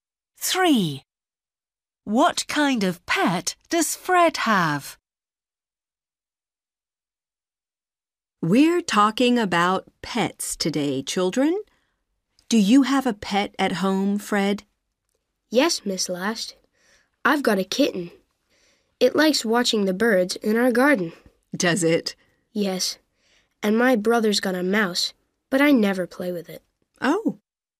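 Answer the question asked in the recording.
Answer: A kitten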